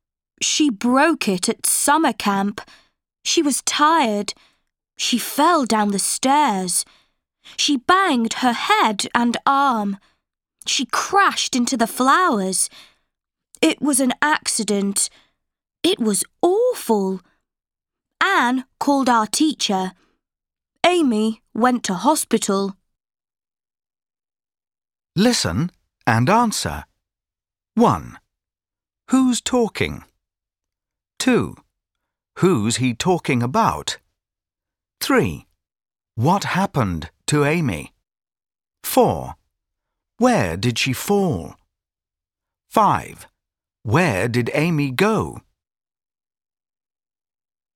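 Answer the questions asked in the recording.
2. Amy
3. She fell down the stairs and broke her arm.
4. Down the stairs
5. To hospital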